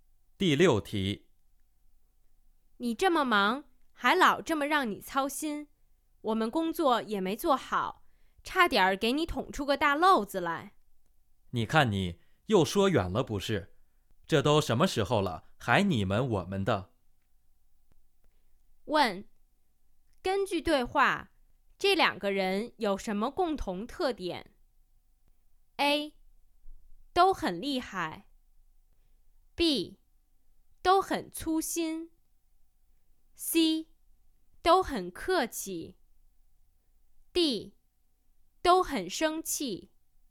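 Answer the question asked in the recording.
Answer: C: 都很客气。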